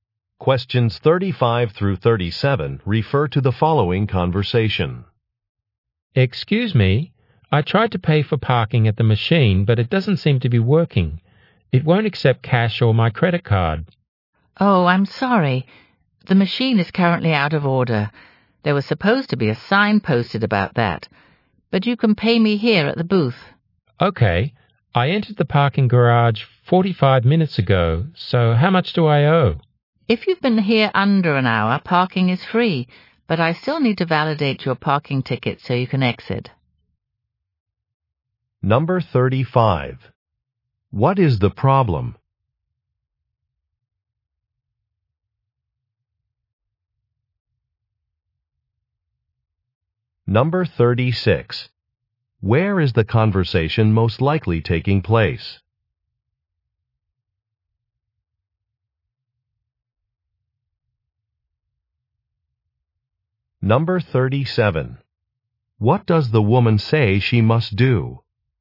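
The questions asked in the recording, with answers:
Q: What is the problem?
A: The payment machine is out of order

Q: Where is the conversation most likely taking place?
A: In a parking garage

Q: What does the woman say she must do?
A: Validate his parking ticket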